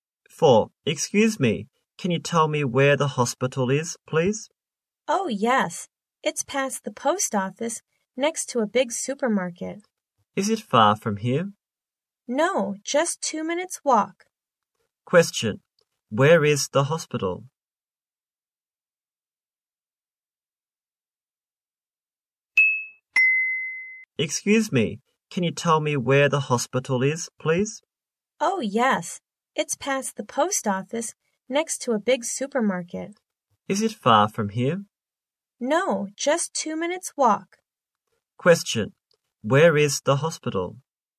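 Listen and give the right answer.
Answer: Past the post office, next to a big supermarket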